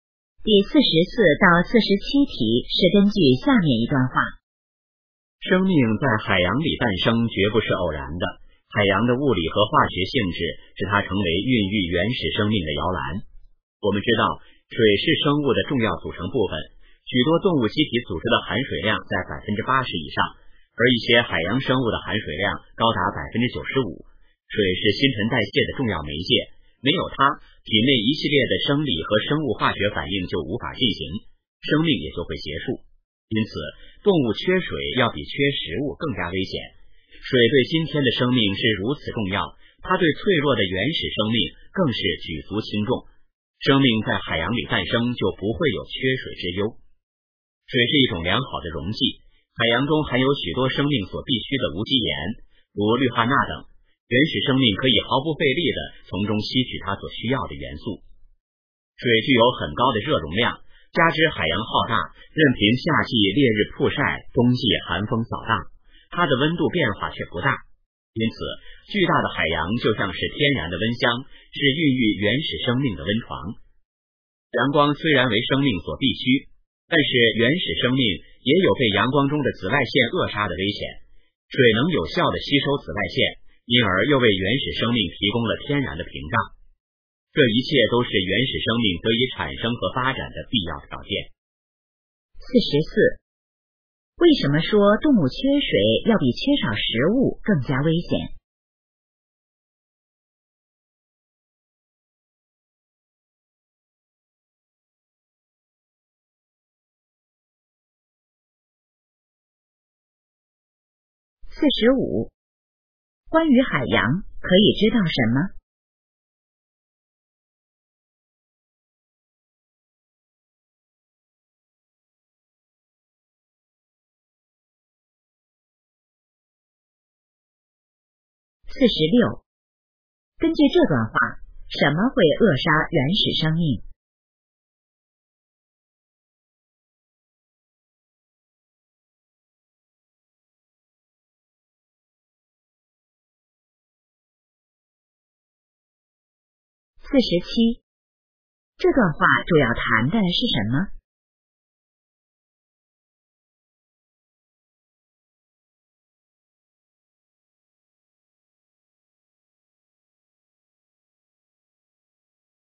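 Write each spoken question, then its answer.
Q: 为什么说动物缺水要比缺少食物更加危险?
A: 水是新陈代谢的重要媒介,没有水生命就会结束

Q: 根据这段话,什么会扼杀原始生命?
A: 阳光中的紫外线

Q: 这段话主要谈的是什么?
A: 生命为什么诞生在海洋里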